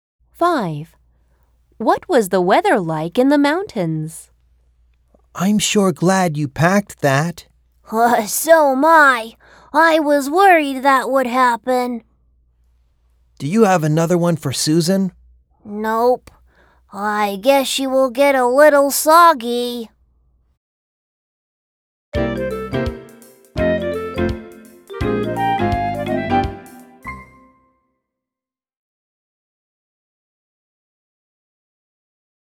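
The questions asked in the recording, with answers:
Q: What was the weather like in the mountains?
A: Rainy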